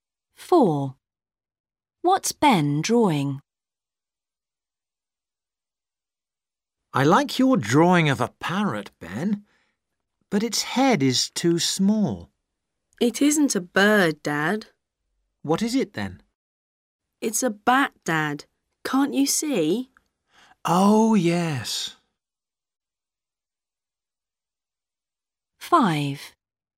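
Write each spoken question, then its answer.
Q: What's Ben drawing?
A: a bat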